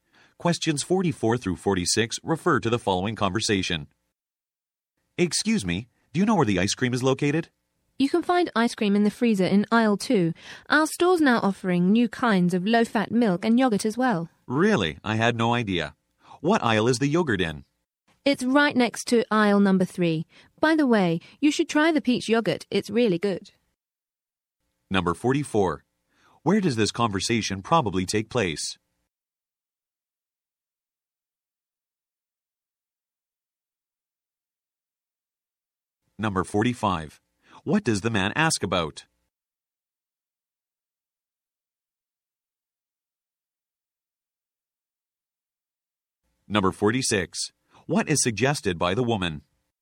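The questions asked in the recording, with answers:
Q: Where does this conversation probably take place?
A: In a grocery store

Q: What does the man ask about?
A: Where the ice cream is located

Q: What is suggested by the woman?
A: Trying the peach yogurt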